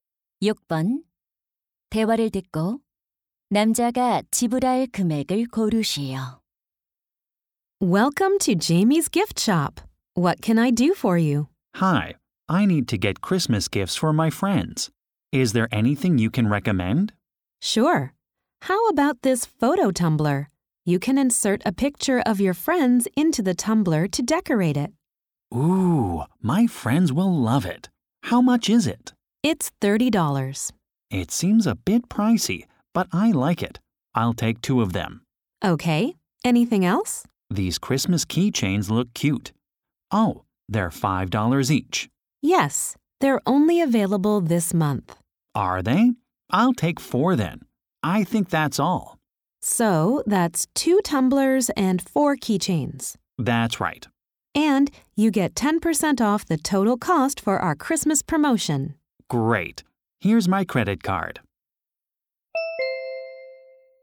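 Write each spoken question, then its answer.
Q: 대화를 듣고 남자가 지불할 금액을 고르시오.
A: $72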